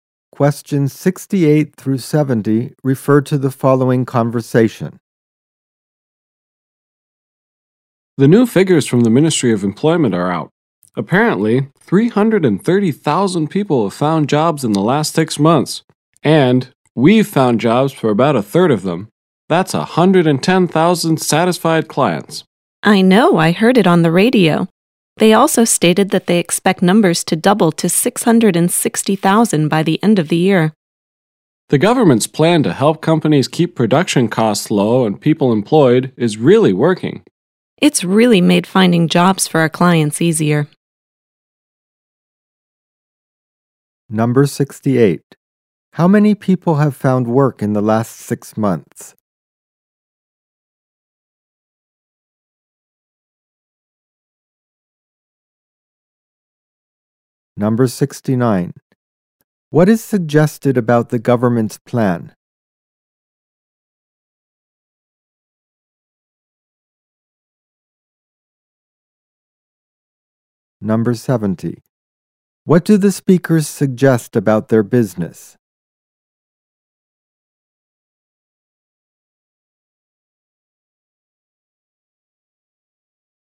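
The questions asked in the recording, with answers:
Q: How many people have found work in the last 6 months?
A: 330,000

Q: What is suggested about the government's plan?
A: It is working, helping companies keep production costs low and people employed.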